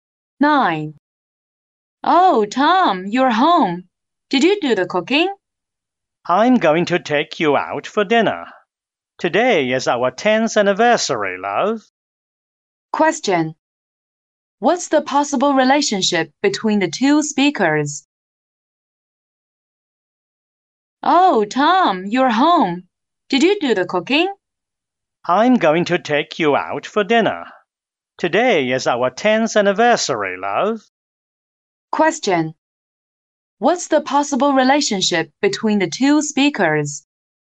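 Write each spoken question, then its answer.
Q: What's the possible relationship between the two speakers?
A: Husband and wife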